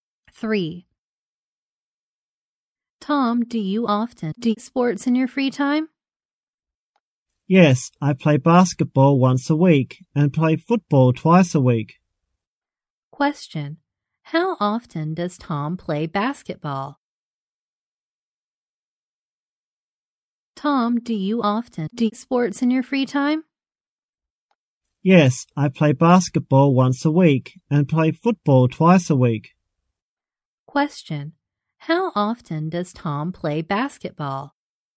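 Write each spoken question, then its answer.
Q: how often does Tom play basketball?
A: Once a week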